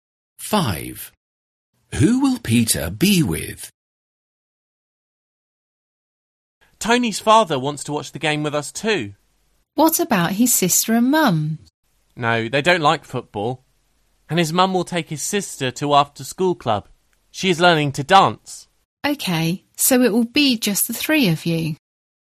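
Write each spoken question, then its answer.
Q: Who will Peter be with?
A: Tony and Tony's father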